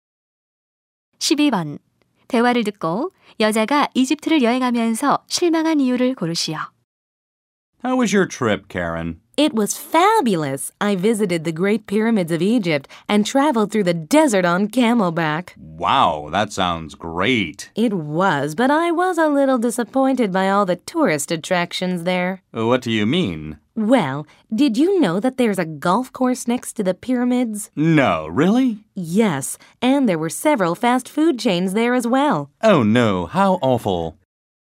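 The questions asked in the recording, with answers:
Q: 대화를 듣고 여자가 이집트를 여행하면서 실망한 이유를 고르시오.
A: 피라미드 옆에 골프장과 패스트푸드점 등 관광 시설이 있어서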